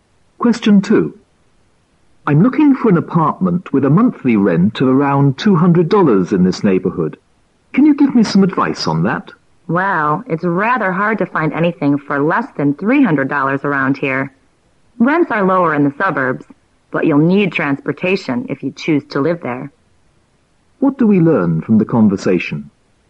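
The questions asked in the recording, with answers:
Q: What do we learn from the conversation?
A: It is hard to find an apartment for $200 in the neighborhood; rents are lower in the suburbs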